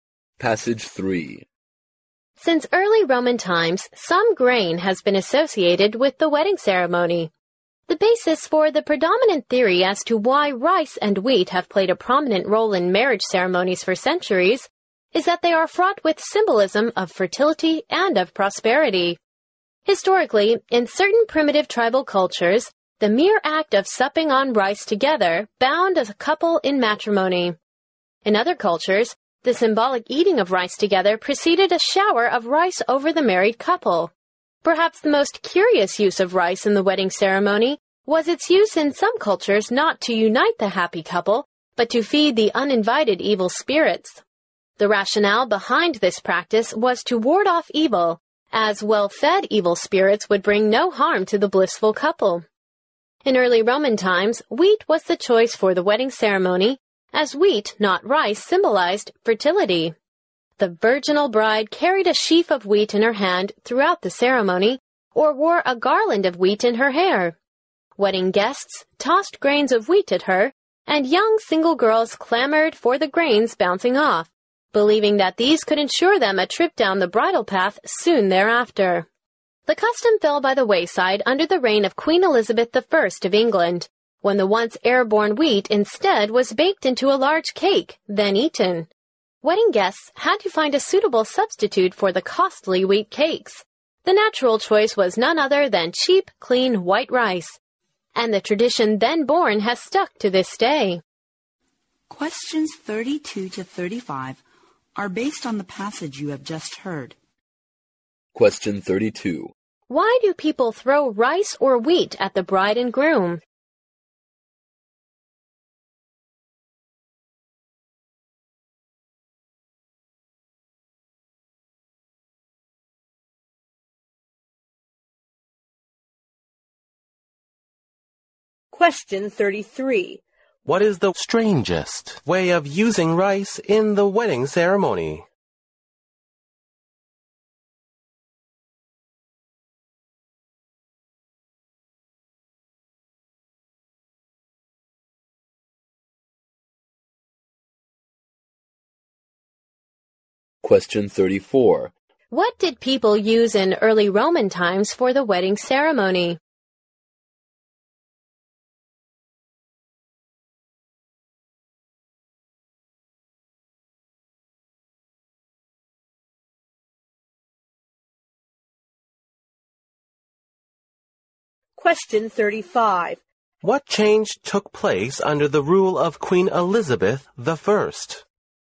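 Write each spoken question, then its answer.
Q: Why do people throw rice or wheat at the bride and groom?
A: They symbolize fertility and prosperity

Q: What is the strangest way of using rice in the wedding ceremony?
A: To feed evil spirits

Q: What did people use in early Roman times for the wedding ceremony?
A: Wheat

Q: What change took place under the rule of Queen Elizabeth I?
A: Wheat was baked into a large cake and eaten instead of thrown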